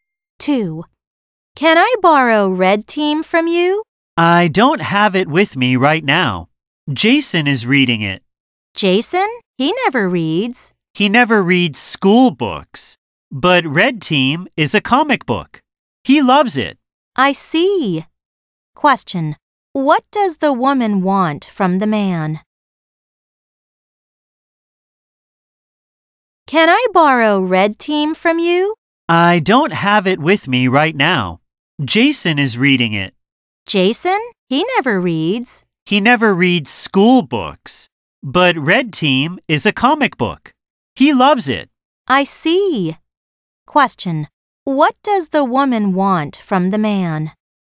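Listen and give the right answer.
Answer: To borrow the comic book Red Team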